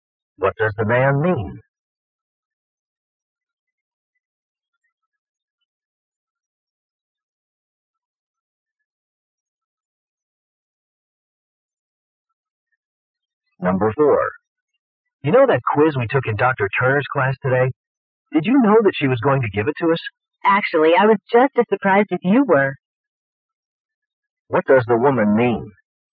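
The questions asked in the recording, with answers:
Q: What does the woman mean?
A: She didn't know about the quiz either.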